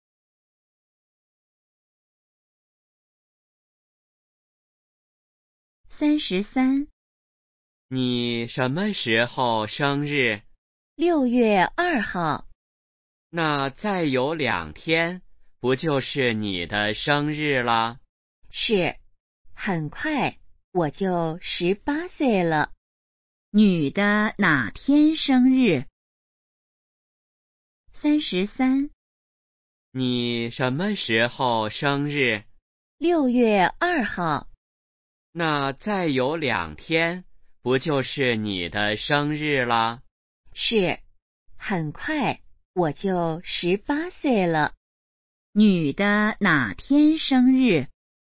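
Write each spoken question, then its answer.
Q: 女的哪天生日?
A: 6月2号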